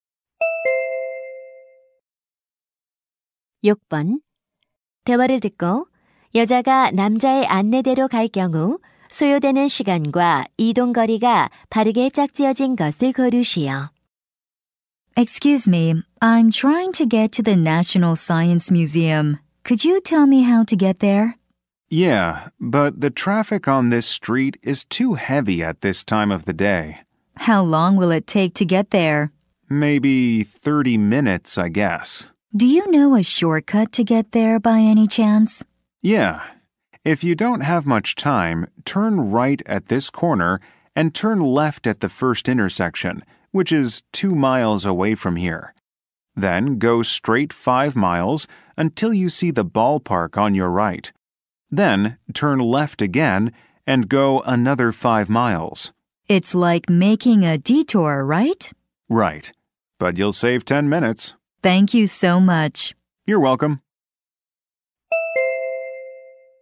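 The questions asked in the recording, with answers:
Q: 대화를 듣고 여자가 남자의 안내대로 갈 경우 소요되는 시간과 이동 거리가 바르게 짝지어진 것을 고르시오.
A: 20분 - 12마일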